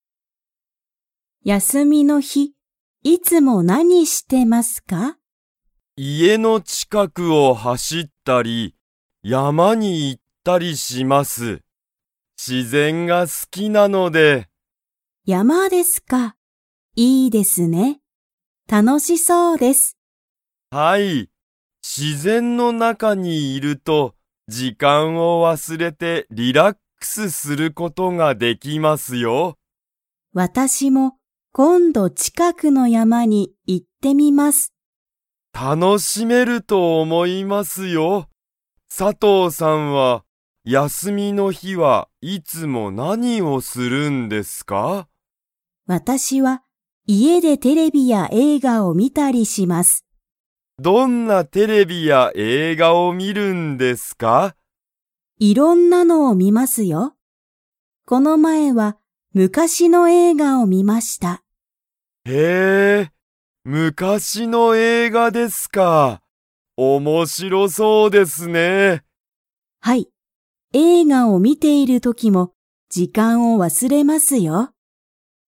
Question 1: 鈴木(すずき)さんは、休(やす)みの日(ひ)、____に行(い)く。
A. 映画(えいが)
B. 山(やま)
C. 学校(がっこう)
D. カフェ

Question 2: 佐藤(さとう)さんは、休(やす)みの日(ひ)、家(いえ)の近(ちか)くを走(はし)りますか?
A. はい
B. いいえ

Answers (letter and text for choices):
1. B. 山(やま)
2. B. いいえ